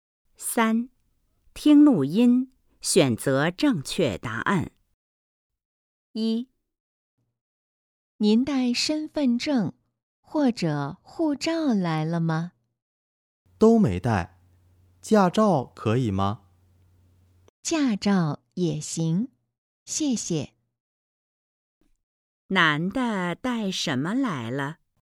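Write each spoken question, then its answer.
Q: 男的带什么来了?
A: 驾照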